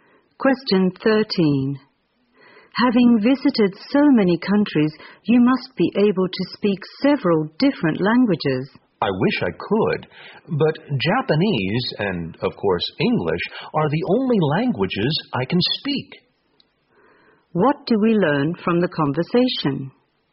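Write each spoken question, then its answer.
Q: What do we learn from the conversation?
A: The speaker can only speak Japanese and English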